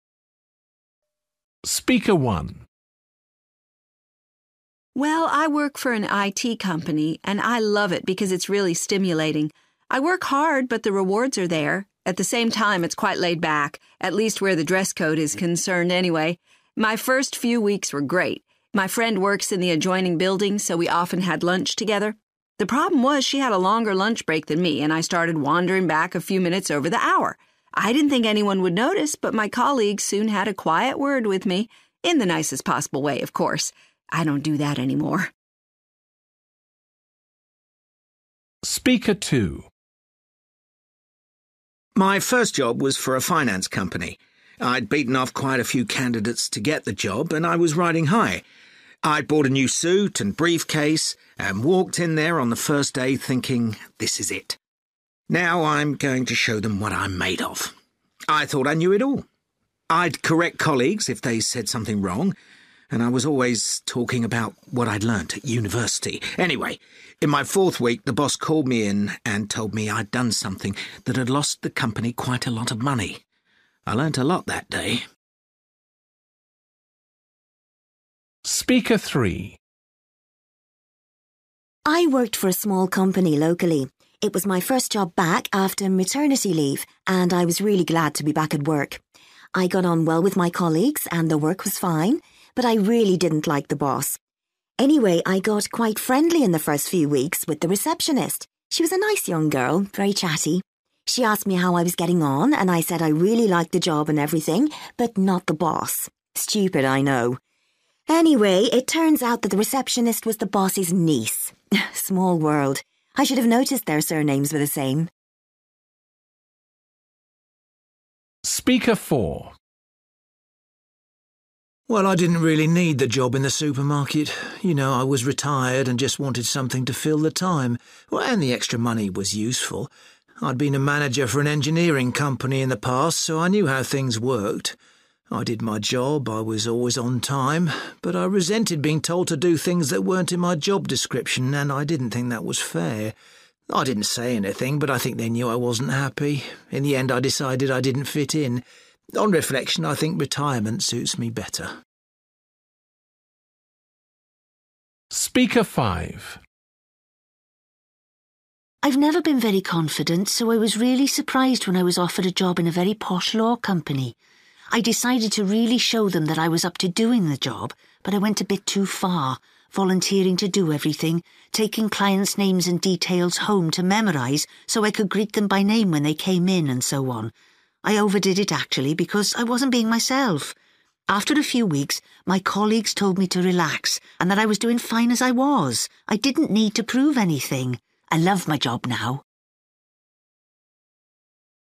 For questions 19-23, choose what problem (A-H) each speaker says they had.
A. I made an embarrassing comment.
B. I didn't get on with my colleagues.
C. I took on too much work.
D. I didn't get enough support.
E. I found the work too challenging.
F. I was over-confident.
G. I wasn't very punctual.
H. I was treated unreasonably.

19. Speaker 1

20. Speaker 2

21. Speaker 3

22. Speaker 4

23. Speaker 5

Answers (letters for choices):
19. G
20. F
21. A
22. H
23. C

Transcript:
Well I work for an IT company and I love it because it's really stimulating. I work hard but the rewards are there. At the same time it's quite laid back – at least where the dress code is concerned anyway. My first few weeks were great. My friend works in the adjoining building so we often had lunch together. The problem was, she had a longer lunch break than me and I started wandering back a few minutes over the hour. I didn't think anyone would notice but my colleagues soon had a quiet word with me – in the nicest possible way of course! I don't do that anymore.
My first job was for a finance company. I'd beaten off quite a few candidates to get the job and I was riding high. I'd bought a new suit and briefcase and walked in there on the first day thinking 'This is it. Now I'm going to show them what I'm made of.' I thought I knew it all. I'd correct colleagues if they said something wrong and I was always talking about what I'd learnt at university. Anyway, in my fourth week the boss called me in and told me I'd done something that had lost the company quite a lot of money. I learnt a lot that day.
I worked for a small company locally. It was my first job back after maternity leave and I was really glad to be back at work. I got on well with my colleagues and the work was fine, but I really didn't like the boss. Anyway, I got quite friendly in the first few weeks with the receptionist. She was a nice young girl – very chatty. She asked me how I was getting on and I said I really liked the job and everything, but not the boss. Stupid I know. Anyway, it turns out that the receptionist was the boss's niece! Small world. I should've noticed their surnames were the same!
Well, I didn't really need the job in the supermarket. You know, I was retired and just wanted something to fill the time and the extra money was useful. I'd been a manager for an engineering company in the past so I knew how things worked. I did my job. I was always on time. But I resented being told to do things that weren't in my job description, and I didn't think that was fair. I didn't say anything but I think they knew I wasn't happy. In the end, I decided I didn't fit in. On reflection, I think retirement suits me better.
I've never been very confident so I was really surprised when I was offered a job in a very posh law company. I decided to really show them that I was up to doing the job, but I went a bit too far – volunteering to do everything, taking clients' names and details home to memorise so I could greet them by name when the came in and so on. I overdid it actually because I wasn't being myself. After a few weeks, my colleagues told me to relax and that I was doing fine as I was. I didn't need to prove anything. I love my job now.